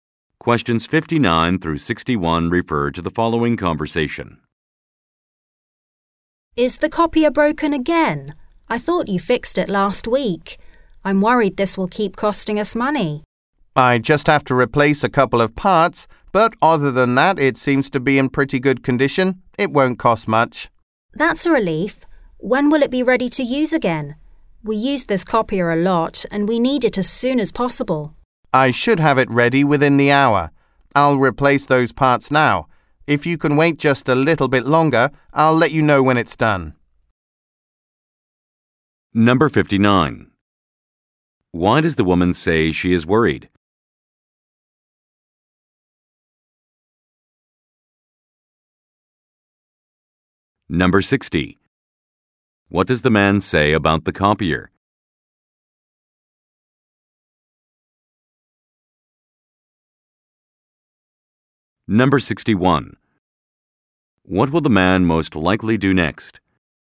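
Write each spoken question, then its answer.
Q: Why does the woman say she is worried?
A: The copier repairs will keep costing money.

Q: What does the man say about the copier?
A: It is in pretty good condition; only a couple of parts need replacing.

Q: What will the man most likely do next?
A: Replace the copier parts.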